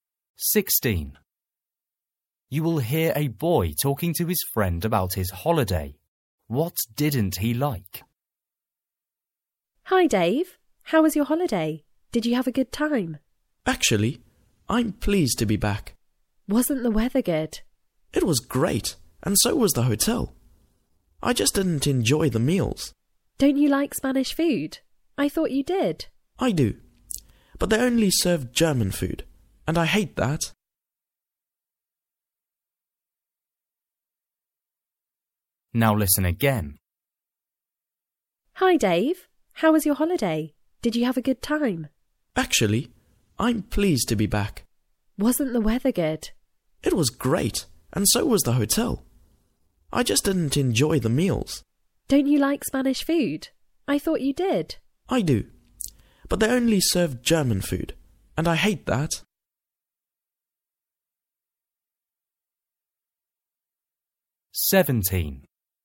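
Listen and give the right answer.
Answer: the meals (German food)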